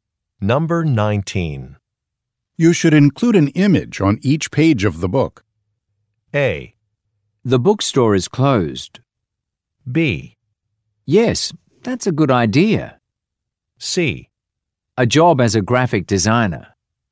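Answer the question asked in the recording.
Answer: B: Yes, that's a good idea.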